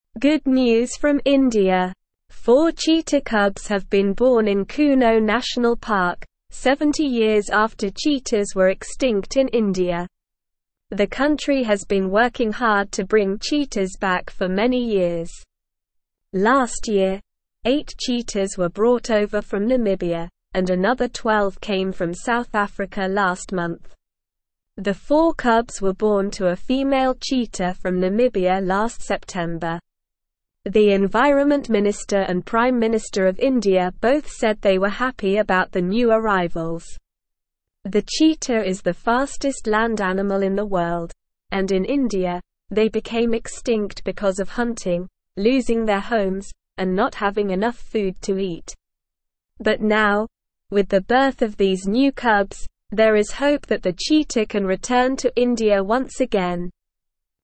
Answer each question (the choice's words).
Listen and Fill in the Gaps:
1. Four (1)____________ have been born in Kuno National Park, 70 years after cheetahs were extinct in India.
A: cheetah cubs

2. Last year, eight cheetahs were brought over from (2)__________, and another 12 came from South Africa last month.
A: Namibia

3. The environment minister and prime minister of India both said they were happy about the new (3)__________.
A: arrivals

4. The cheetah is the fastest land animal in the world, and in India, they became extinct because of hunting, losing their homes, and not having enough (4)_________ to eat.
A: food

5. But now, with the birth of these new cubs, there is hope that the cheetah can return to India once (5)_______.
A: again

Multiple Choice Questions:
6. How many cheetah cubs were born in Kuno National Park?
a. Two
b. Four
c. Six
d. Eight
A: Four

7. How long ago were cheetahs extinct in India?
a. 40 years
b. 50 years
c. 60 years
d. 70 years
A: 70 years

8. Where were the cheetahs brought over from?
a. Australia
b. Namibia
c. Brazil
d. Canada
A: Namibia

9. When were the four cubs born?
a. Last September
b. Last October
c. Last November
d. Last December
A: Last September

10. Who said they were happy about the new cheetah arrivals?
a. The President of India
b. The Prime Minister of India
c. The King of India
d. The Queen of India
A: The Prime Minister of India

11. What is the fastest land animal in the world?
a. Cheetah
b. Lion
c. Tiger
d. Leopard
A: Cheetah

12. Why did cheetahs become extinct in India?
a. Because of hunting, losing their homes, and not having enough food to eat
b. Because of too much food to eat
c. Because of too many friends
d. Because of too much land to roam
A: Because of hunting, losing their homes, and not having enough food to eat

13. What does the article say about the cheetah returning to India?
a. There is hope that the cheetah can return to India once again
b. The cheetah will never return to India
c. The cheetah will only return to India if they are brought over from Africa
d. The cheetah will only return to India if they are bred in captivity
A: There is hope that the cheetah can return to India once again

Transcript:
Good news from India! Four cheetah cubs have been born in Kuno National Park, 70 years after cheetahs were extinct in India. The country has been working hard to bring cheetahs back for many years. Last year, eight cheetahs were brought over from Namibia, and another 12 came from South Africa last month. The four cubs were born to a female cheetah from Namibia last September. The environment minister and prime minister of India both said they were happy about the new arrivals. The cheetah is the fastest land animal in the world, and in India, they became extinct because of hunting, losing their homes, and not having enough food to eat. But now, with the birth of these new cubs, there is hope that the cheetah can return to India once again.

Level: Level 1